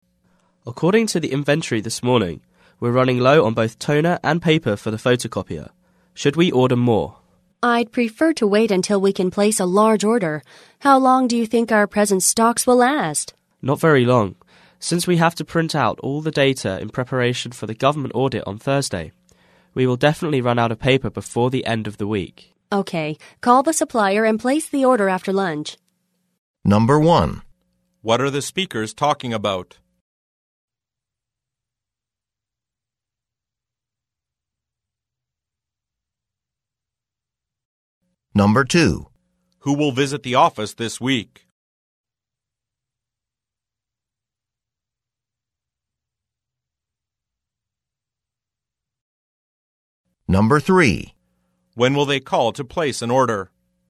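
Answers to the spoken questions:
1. Running low on toner and paper for the photocopier (ordering office supplies)
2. Government auditors
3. After lunch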